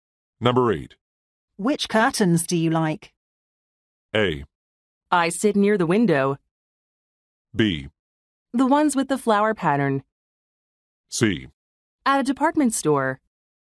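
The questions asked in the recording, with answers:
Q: Which curtains do you like?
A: B: The ones with the flower pattern.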